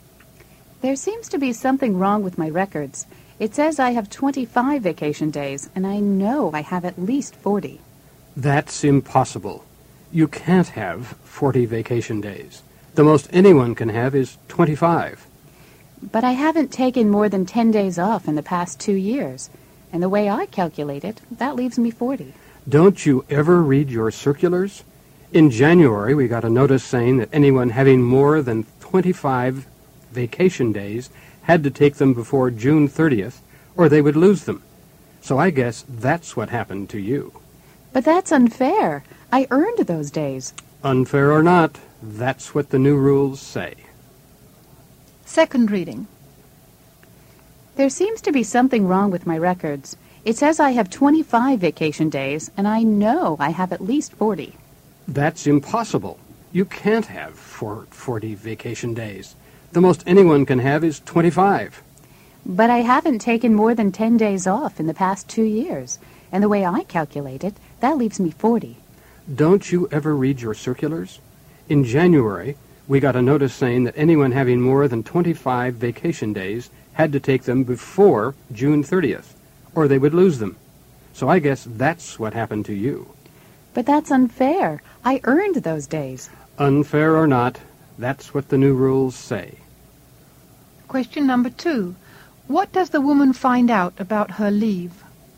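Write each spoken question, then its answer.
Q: What does the woman find out about her leave?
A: She lost the vacation days over 25 because she didn't take them before June 30th, under the new rules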